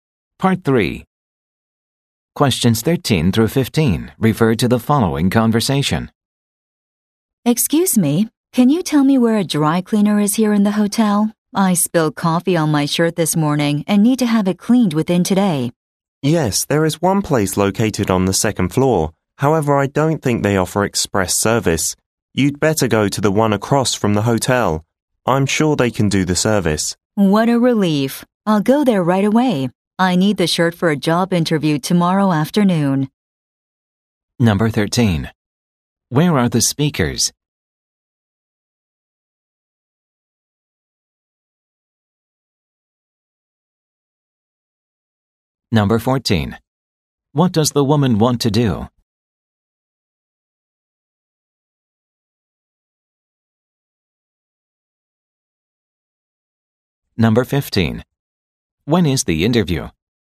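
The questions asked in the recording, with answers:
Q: Where are the speakers?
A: In a hotel

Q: What does the woman want to do?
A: Have her shirt cleaned today

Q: When is the interview?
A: Tomorrow afternoon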